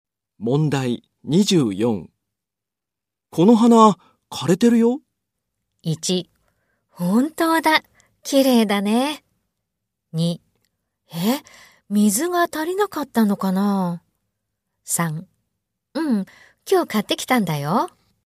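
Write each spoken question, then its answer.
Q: この花、枯れてるよ。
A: 2: え、水が足りなかったのかな。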